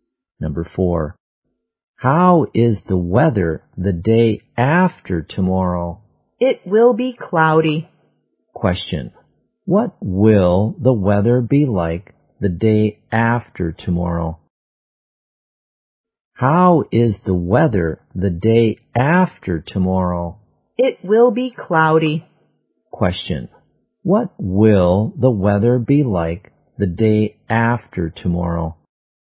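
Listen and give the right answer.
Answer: Cloudy.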